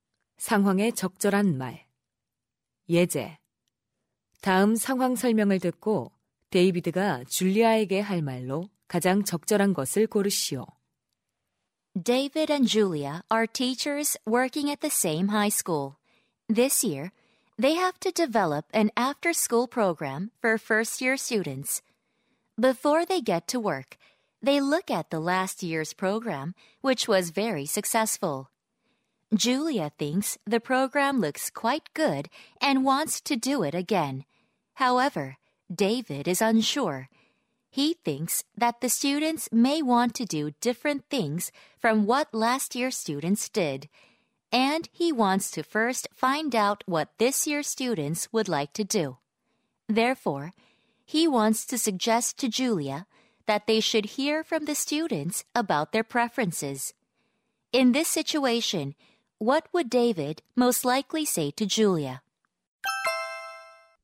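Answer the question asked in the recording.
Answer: Let's first ask the students what they would like to do this year.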